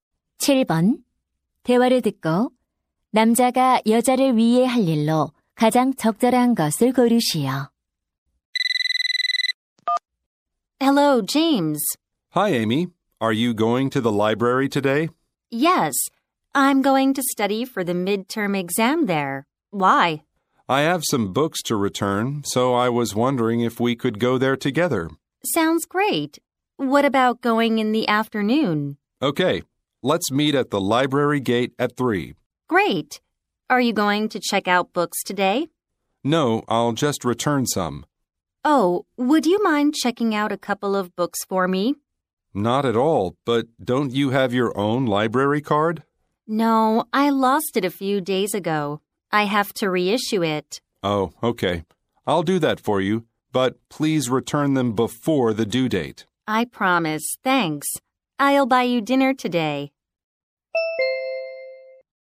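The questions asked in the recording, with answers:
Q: 대화를 듣고 남자가 여자를 위해 할 일로 가장 적절한 것을 고르시오.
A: 도서관에서 책 대출해 주기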